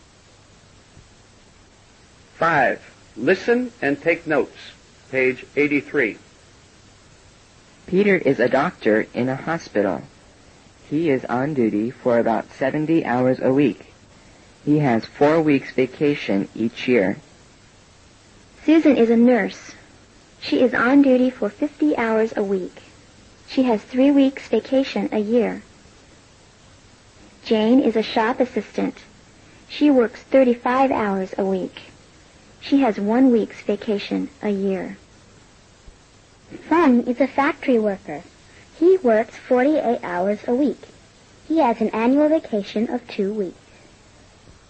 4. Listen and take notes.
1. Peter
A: doctor 70 a four-week vacation

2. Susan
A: nurse 50 a three-week vacation

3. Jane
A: shop assitant 35 a one-week vacation

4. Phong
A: factory worker 48 a two-week vacation

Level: Lớp 7